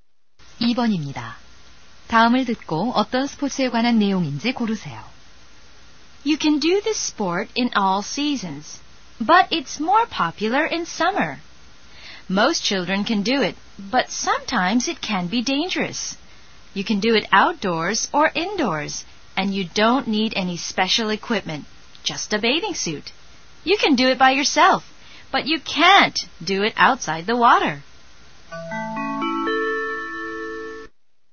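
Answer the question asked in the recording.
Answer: 수영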